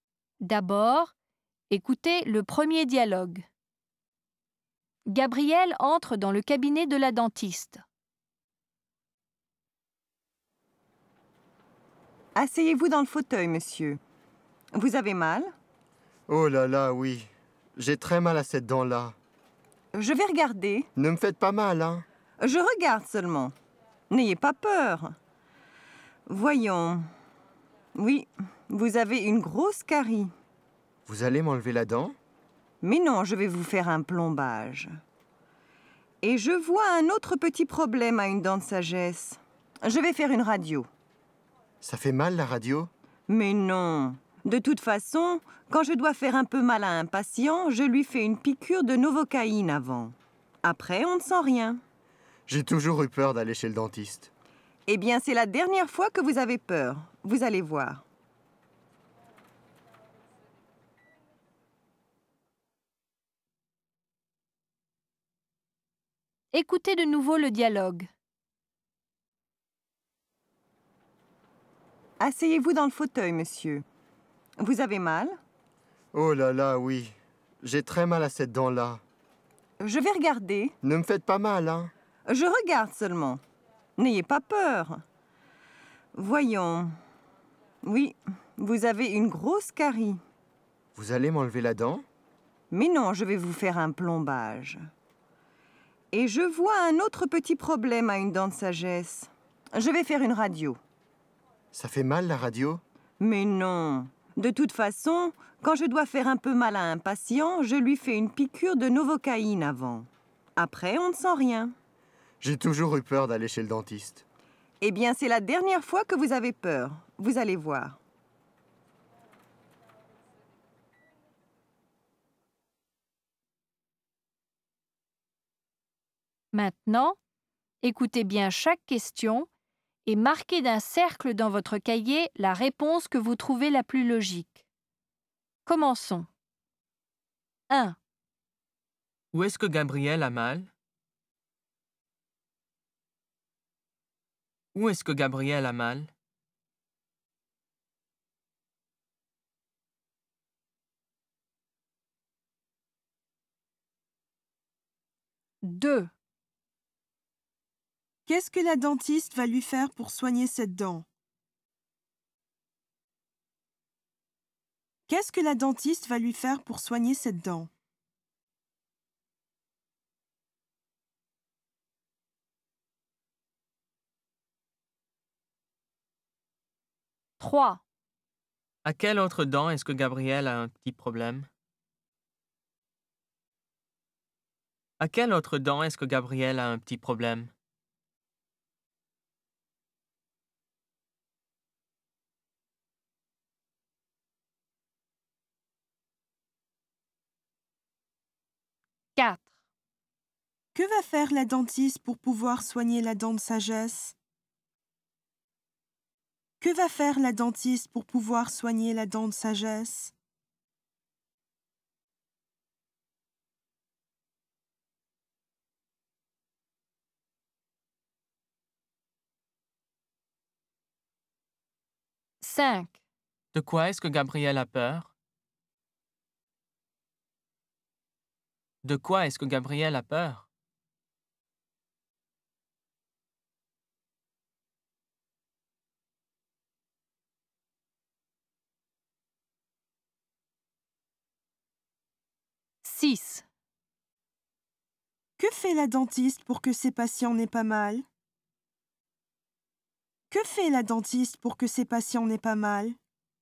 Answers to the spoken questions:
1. 1B
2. 2A
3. 3B
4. 4C
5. 5C
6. 6B